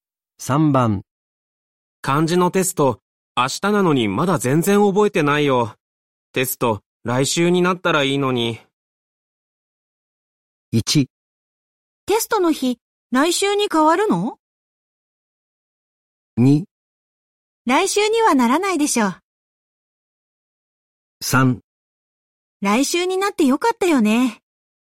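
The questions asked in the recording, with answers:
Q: 漢字のテスト、明日なのにまだ全然覚えてないよ。テスト、来週になったらいいのに。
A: 2: 来週にはならないでしょう。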